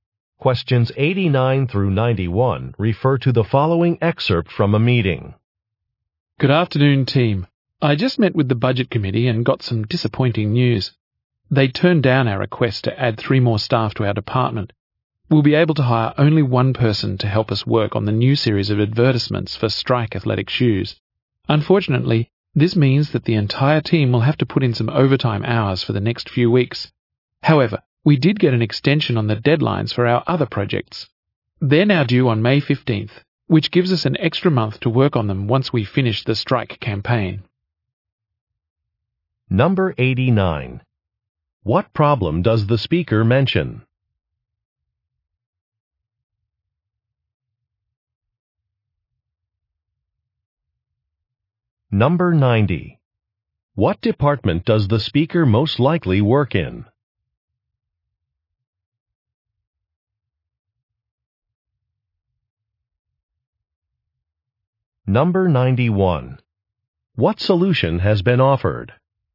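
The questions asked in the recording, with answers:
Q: What problem does the speaker mention?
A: A request for more staff was denied

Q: What department does the speaker most likely work in?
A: Advertising

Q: What solution has been offered?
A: Deadlines for other projects were extended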